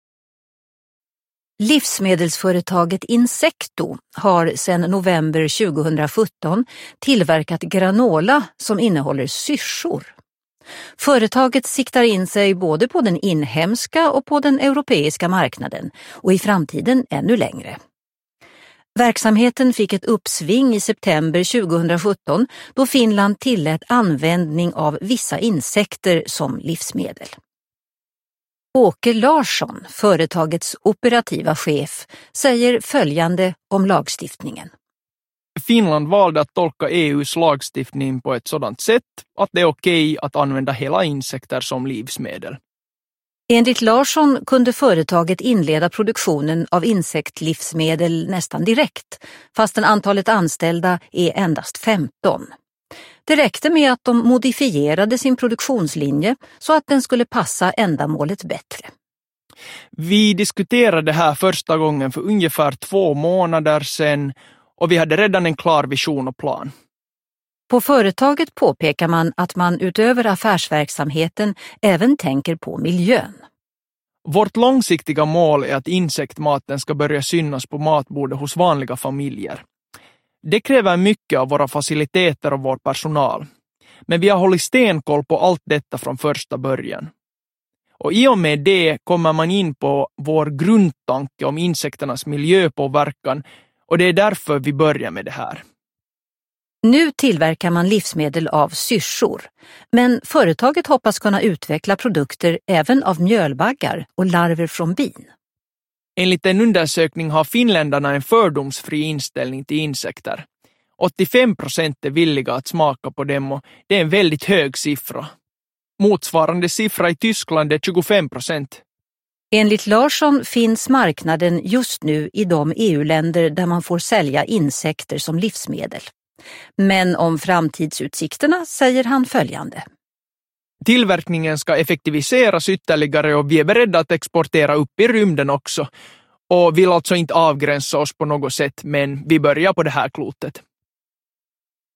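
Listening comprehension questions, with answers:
4. Lyssna på en nyhetsrapport om syrsor. Du hör nyheten först i sin helhet och sedan i delar. Svara på frågorna efter varje avsnitt.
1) Vilka framtidsplaner har firman? (3 p.)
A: Att sälja på den inhemska och europeiska marknaden och i framtiden ännu längre bort

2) Vad krävdes av företaget Insecto för att de skulle kunna börja producera sin produkt? (3 p.)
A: Bara att modifiera sin produktionslinje

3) Vad vill Insecto uppnå? (3 p.)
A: Att insektsmat ska synas på matbordet hos vanliga familjer

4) Vad tycker finländarna om insektsmat? (3 p.)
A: De är fördomsfria; 85 % är villiga att smaka

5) Mitkä ovat sirkkaviljelyn tulevaisuuden näkymät (2 asiaa)? Vastaa lyhyesti suomeksi. (4 p.)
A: Tuotantoa tehostetaan edelleen; ollaan valmiita viemään tuotteita jopa avaruuteen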